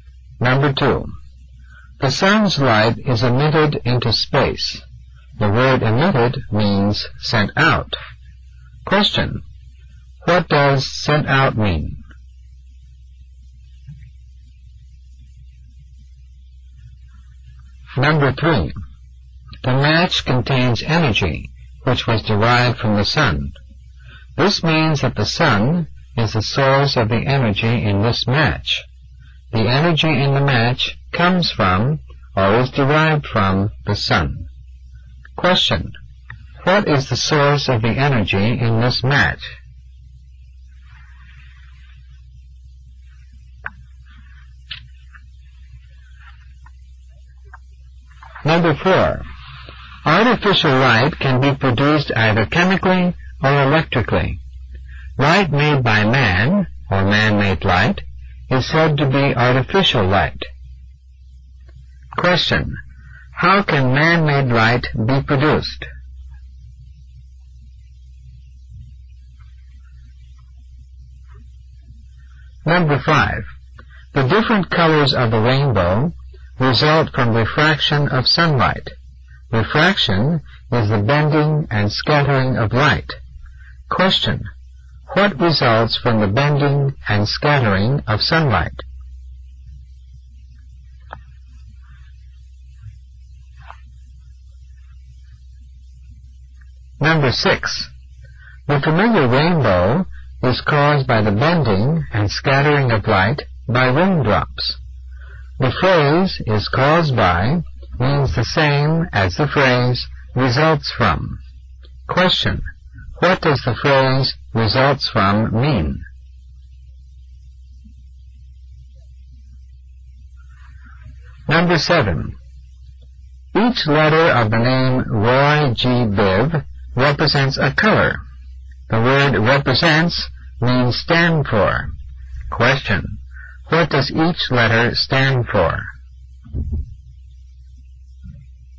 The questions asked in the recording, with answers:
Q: What does sent out mean?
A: For number 2, the correct answer is B, emitted.

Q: What is the source of the energy in this match?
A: For number three, the correct answer is C.

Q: How can man-made light be produced?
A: For number four, the correct answer is C, chemically or electrically.

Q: What results from the bending and scattering of sunlight?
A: The correct answer for number five is A, the different colors of the rainbow.

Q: What does the phrase "results from" mean?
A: For number six, you should have circled the letter C, is caused by.

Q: What does each letter stand for?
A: And for number seven, the last one, the correct answer is C, a color.